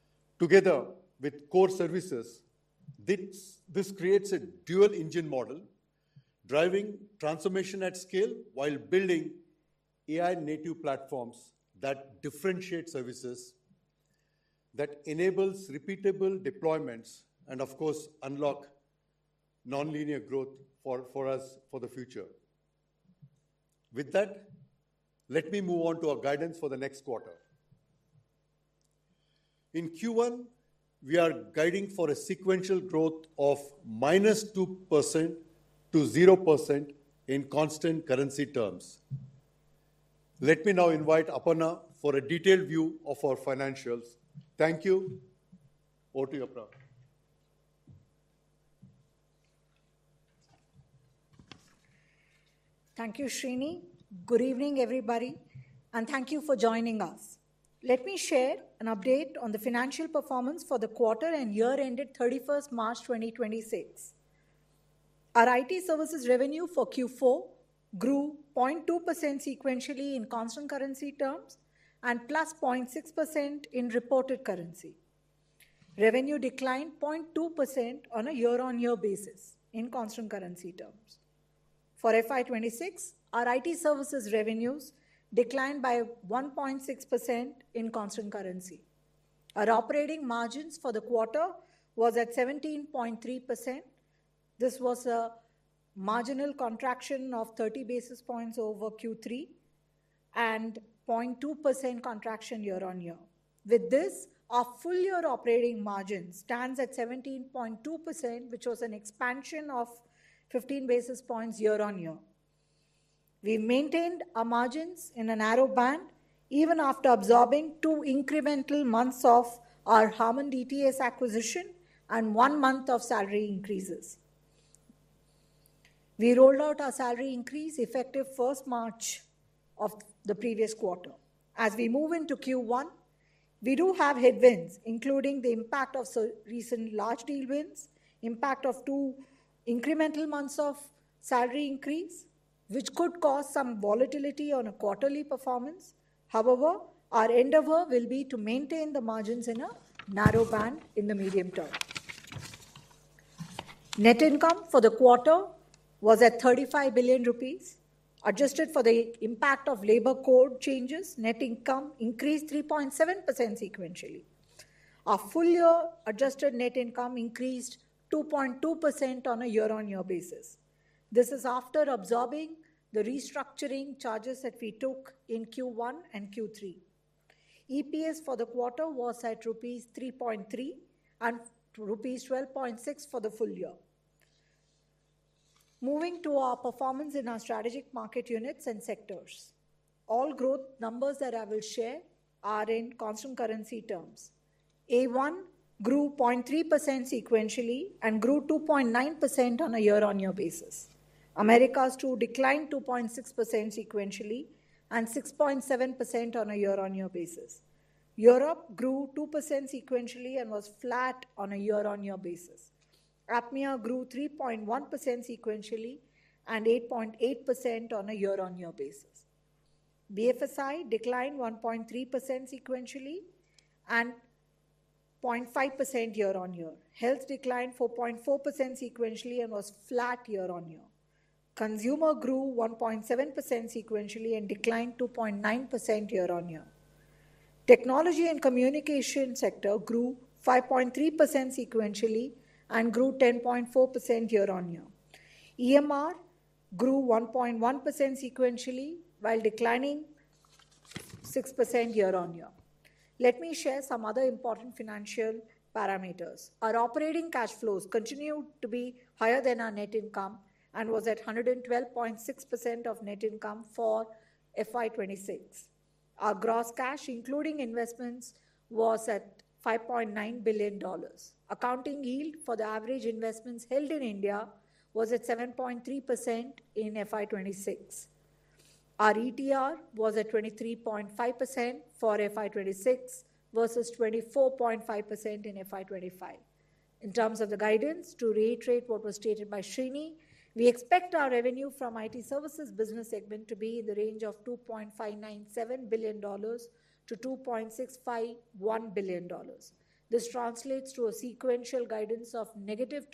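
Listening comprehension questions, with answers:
用 1-2 句话用自己的话回答下面的问题。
What is the Q1 guidance for sequential growth in constant currency terms, and what is the corresponding revenue range in dollars provided by the CFO?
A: -2% to 0% sequential growth; $2.597 billion to $2.651 billion

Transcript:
This unit will also incubate new AI-led businesses through an invest-build partner approach and collaborate with Wipro Ventures and our entire partner ecosystem.
Together with core services, this creates a dual-engine model driving transformation at scale while building AI-native platforms that differentiate services
Together with core services, this this creates a dual engine model driving transformation at scale while building building AI native platforms that differentiate services services that enables repeatable deployments and of course unlock of course unlock non-linear growth for for us for the future. 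future. With that, With that, let me move on to our guidance for the next quarter. In Q1, In Q1, we are guiding for a sequential growth of minus 2% to 0% in constant currency terms. terms. Let
me now invite Aparna for a detailed view of our financials. Thank you. Over to you, Aparna. Thank you, Srini. Good evening, everybody. And thank you for joining us. Let me share an update on the financial performance for the quarter and year ended 31st March 2026. Our IT services revenue for Q4 grew 0.2% sequentially in constant currency terms and plus 0.6% in reported currency. Revenue declined 0.2% on a year-on-year basis in constant currency terms. For FY26, our IT services revenues declined by 1.6% in constant currency. Our
operating margins for the quarter was at 17.3%. was at 17.3%. This was a This was a marginal contraction of 30 basis points over Q3 over Q3 and 0.2% contraction year-on-year. 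With this, our full year operating margin stands at 17.2%, which was an expansion of 15 basis points year-on-year. We maintained our margins in a narrow band even after absorbing two incremental months of our Harman DTS acquisition and one month of salary increases. increases. We rolled out our salary increase effective 1st March of the previous quarter. As
we move into Q1, we do have headwinds including the impact of recent large deal wins, impact of two incremental months of salary increase, which could cause some volatility on a quarterly performance. However, our endeavor will be to maintain the margins in a narrow band in the medium term. Net income for the quarter was at 35 billion rupees. Adjusted for the impact of labor code changes, net income increased 3.7% sequentially. Our full year adjusted net income increased 2.2% on a year-on-year basis. This is
after absorbing the restructuring charges that we took in Q1 and Q3. 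and Q3. EPS for the quarter was at rupees 3.3 and rupees 12.6 for the full year. Moving to our performance in our strategic market units and sectors, all growth numbers that I will share are in constant currency terms. A1 grew 0.3% sequentially and grew 2.9% on a year-on-year basis. Americas two declined 2.6% sequentially and 6.7% on a year-on-year basis. Europe grew 2% sequentially and was flat on a year-on-year basis. APMEA grew 3.1%
BFSI declined 1.3% sequentially and and 0.5% year-on-year. Health declined 4.4% sequentially and was flat year-on-year. Consumer grew 1.7% sequentially and declined 2.9% year-on-year. declined 2.9% year-on-year. Technology and communication sector grew 5.3% sequentially and grew 10.4% year-on-year. year-on-year. EMR grew 1.1% sequentially while declining declining 6% year-on-year. Let me share some other important financial parameters. Our operating cash flows continued to be higher than our net income and was at 112.6% of net income for FY26. 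Our
gross cash including investments was at 5.9 billion dollars. Accounting yield for the average investments held in India was at 7.3% in FY26. in FY26. Our ETR was at 23.5% for FY26 versus 24.5% in FY25. In terms of the guidance to reiterate what was stated by Srini, we expect our revenue from IT services business segment to be in the range of 2.597 billion dollars to 2.651 billion dollars.
In terms of the guidance, to reiterate what was stated by Shini, we expect our revenue from it services business segment to be in the range of $2.597 billion to $2.651 billion. This translates to a sequential guidance of negative.

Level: CEFRC1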